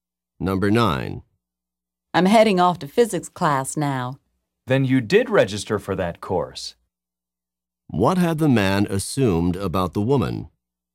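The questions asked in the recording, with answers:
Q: What had the man assumed about the woman?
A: She had not registered for the physics course.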